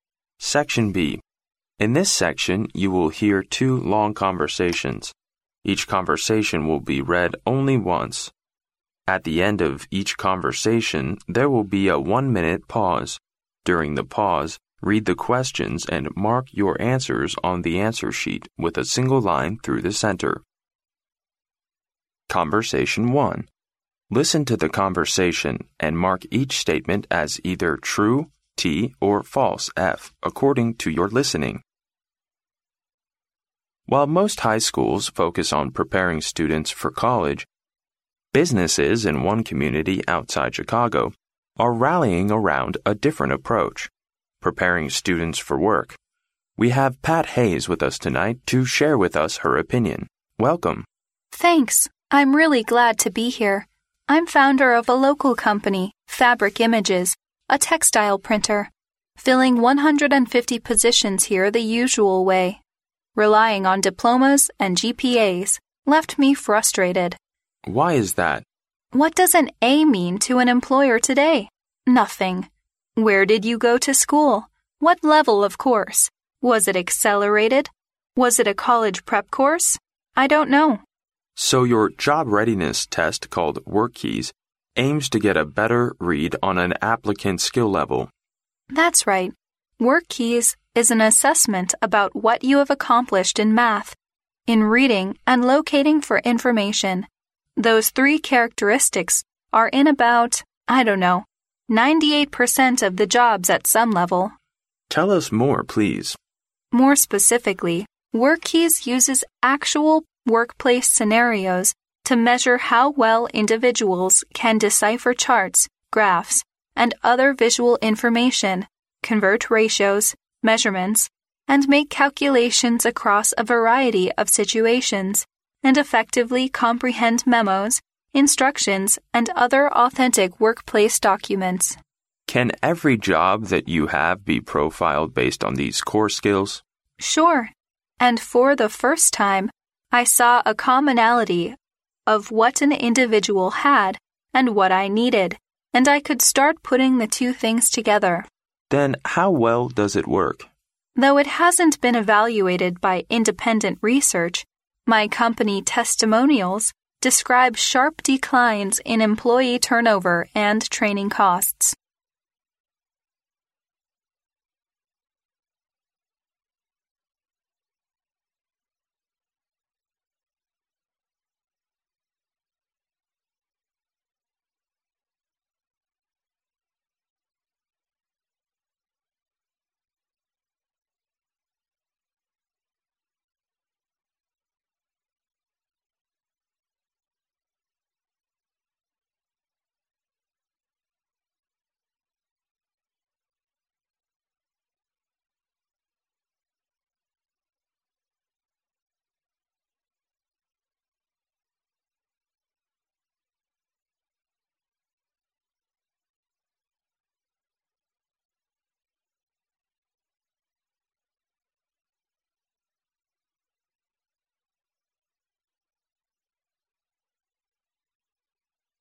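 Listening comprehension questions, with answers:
Listen to the conversation, and mark each statement as either true (T) or false (F) according to your listening.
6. Companies usually hire people based on their diplomas and GPAs.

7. Pat Hayes is applying for a job at the textile printer Fabric Images.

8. WorkKeys aims to get a better understanding of applicants' skill levels.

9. WorkKeys helps increase staff stability and cut training costs.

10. WorkKeys has passed the evaluation of independent research.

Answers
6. T
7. F
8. T
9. T
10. F

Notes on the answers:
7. 由女士的话I'm founder of a local company, Fabric Images, a textile printer可知,她是Fabric Images这家公司的创始人,而不是应聘者。故该判断错误。
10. 参考上题解析,可知该判断错误。

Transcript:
M: While most high schools focus on preparing students for college, businesses in one community outside Chicago are rallying around a different approach, preparing students for work. 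We have Pat Hayes with us tonight to share with us her opinion. Welcome!
W: Thanks. I'm really glad to be here. I'm founder of a local company, Fabric Images, a textile printer. Filling 150 positions here the usual way, relying on diplomas and GPAs, left me frustrated.
M: Why is that?
W: What does an A mean to an employer today? Nothing. Where did you go to school? What level of course? Was it accelerated? Was it a college prep course? I don't know.
M: So your job-readiness test called WorkKeys aims to get a better read on an applicant's skill level.
W: That's right. WorkKeys is an assessment about what you have accomplished in math, in reading and locating for information. Those three characteristics are in about, I don't know, 98 percent of the jobs at some level.
M: Tell us more, please.
W: More specifically, WorkKeys uses actual workplace scenarios to measure how well individuals can decipher charts, graphs and other visual information, convert ratios, measurements, and make calculations across a variety of situations, and effectively comprehend memos, instructions and other authentic workplace documents.
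M: Can every job that you have be profiled based on these core skills?
W: Sure. And for the first time, I saw a commonality of what an individual had and what I needed, and I could start putting the two things together.
M: Then how well does it work?
W: Though it hasn't been evaluated by independent research, my company testimonials describe sharp declines in employee turnover and training costs.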